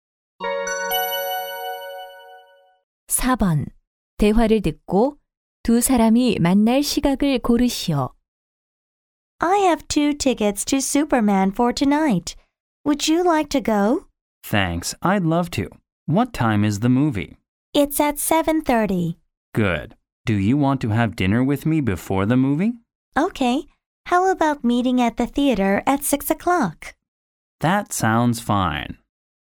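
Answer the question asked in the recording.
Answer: 6시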